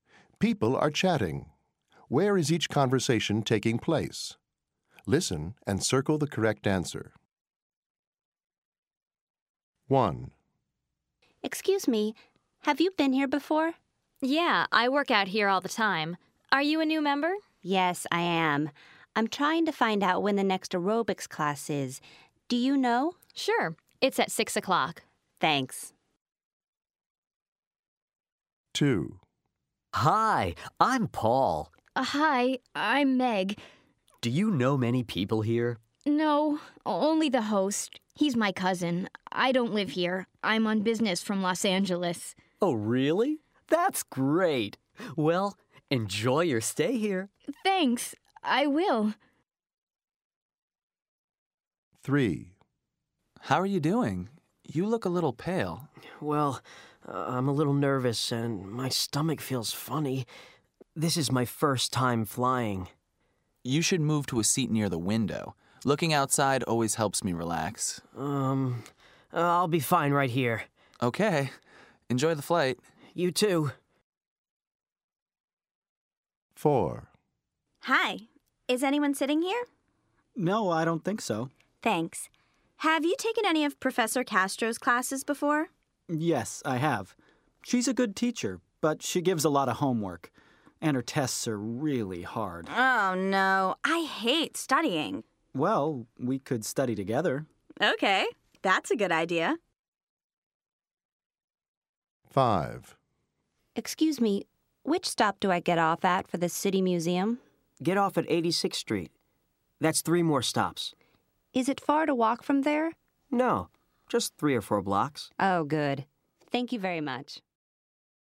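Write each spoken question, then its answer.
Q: Where is each conversation taking place?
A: At a gym

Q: Where is each conversation taking place?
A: At a party

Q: Where is each conversation taking place?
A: On an airplane

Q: Where is each conversation taking place?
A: In a classroom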